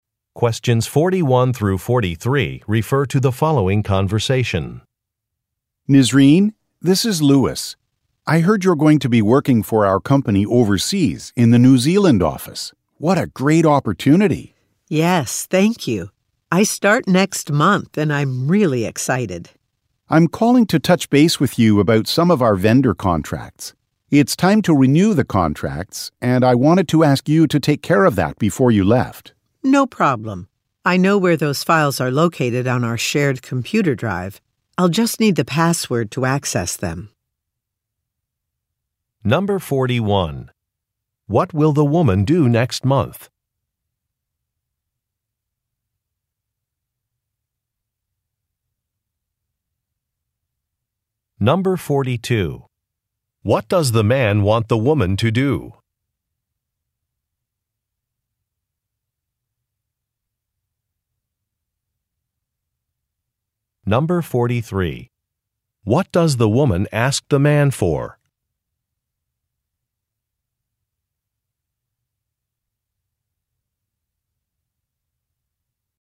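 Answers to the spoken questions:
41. Start working at the company's New Zealand office
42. Renew the vendor contracts
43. A password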